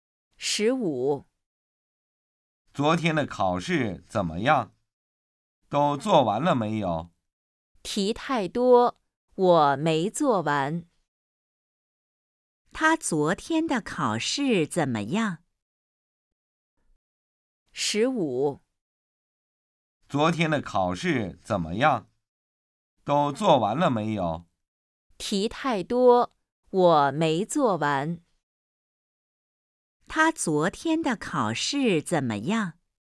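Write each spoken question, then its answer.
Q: 他昨天的考试怎么样?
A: 题太多,没做完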